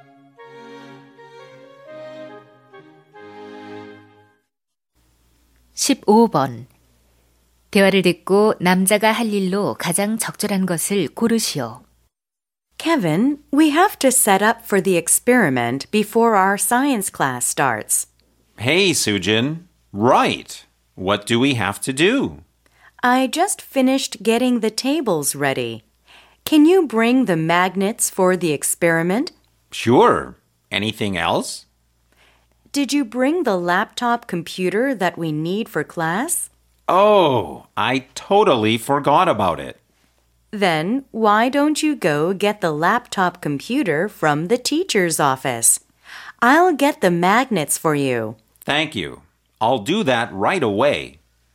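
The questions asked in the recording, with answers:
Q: 대화를 듣고 남자가 할 일로 가장 적절한 것을 고르시오.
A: 교무실에서 노트북 컴퓨터 가져오기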